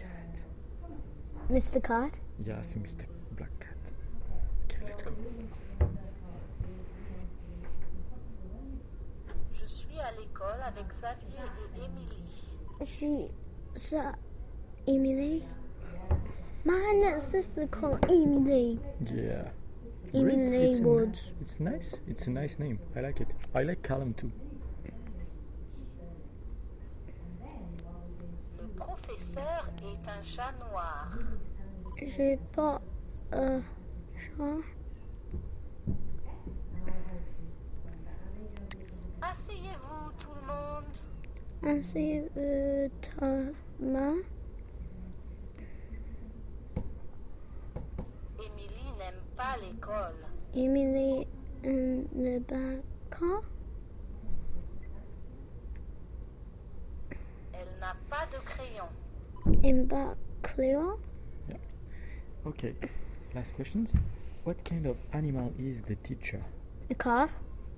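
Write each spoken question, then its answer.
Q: What kind of animal is the teacher?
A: A black cat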